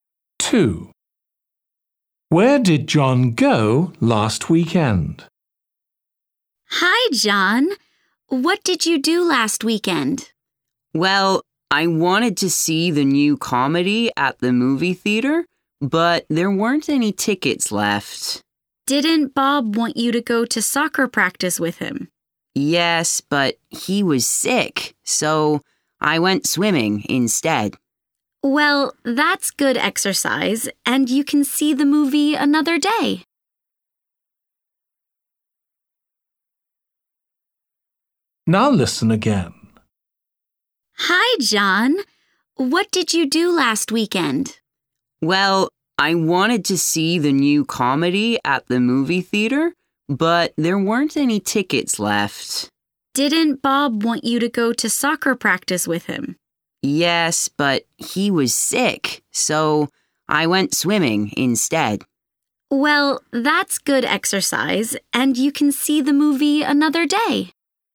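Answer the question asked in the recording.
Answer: swimming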